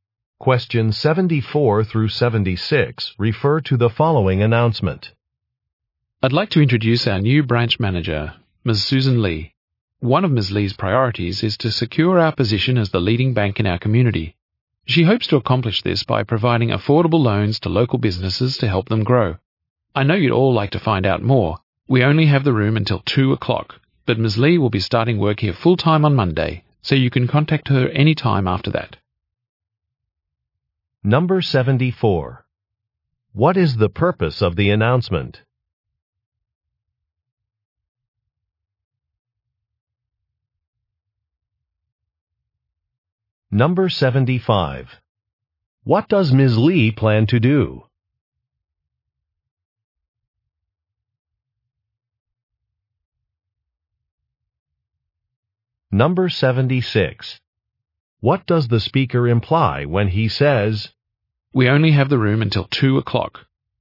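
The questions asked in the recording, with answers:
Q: What is the purpose of the announcement?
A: To introduce a new branch manager

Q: What does Ms. Lee plan to do?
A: Provide affordable loans to local businesses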